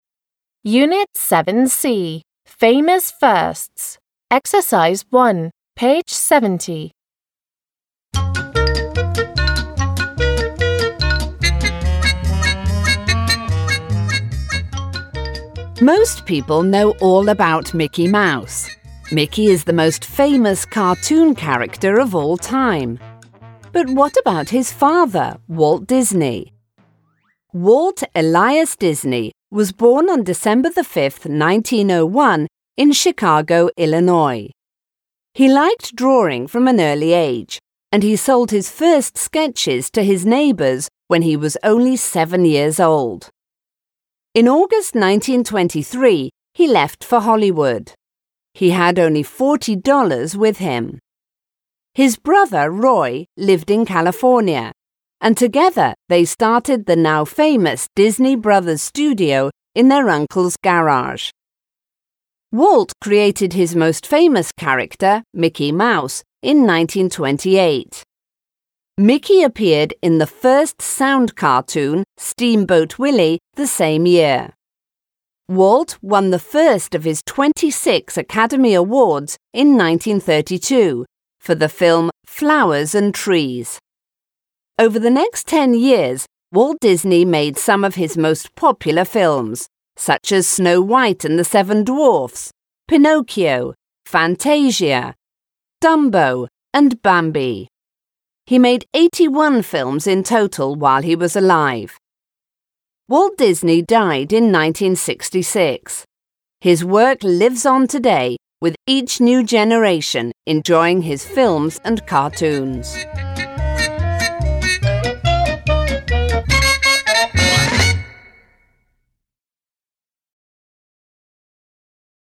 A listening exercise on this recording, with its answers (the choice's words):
1. How much do you know about Walt Disney? Try to complete the sentences. Listen, read and check.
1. Walt Disney was born in the US.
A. the US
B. the UK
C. Australia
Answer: the US

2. He sold his first drawing at the age of 7.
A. 10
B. 7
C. 20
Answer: 7

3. He received 26 Academy Awards in his lifetime.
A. 2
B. 26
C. 12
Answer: 26

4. He made 81 films while he was alive.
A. 91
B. 41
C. 81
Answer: 81

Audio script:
1. Most people know all about Mickey Mouse. Mickey is the most famous cartoon character of all time, but what about his father, Walt Disney?
Walt Elias Disney was born on December 5th 1901 in Chicago Illinois. He liked drawing from an early age and he sold his first sketches to his neighbours when he was only seven years old. In August 1923 he left for Hollywood. He had only $40 with him. His brother Roy lived in California and together they started the now famous Disney Brothers studio in their uncle's garage.
Walt created his most famous character Mickey Mouse in 1928. Mickey appeared in the first sound cartoon, Steamboat Willie the same year. Walt won the first of his 26 Academy Awards in 1932 for the film Flowers and Trees. Over the next ten years Walt Disney made some of his most popular films such as Snow White and the Seven Dwarfs, Pinocchio, Fantasia, Dumbo and Bambi. He made 81 films in total while he was alive.
In 1966 Walt Disney was working at a new film when in December he died. His work lives on today with each new generation enjoying his films and cartoons.
1.

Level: 6 класс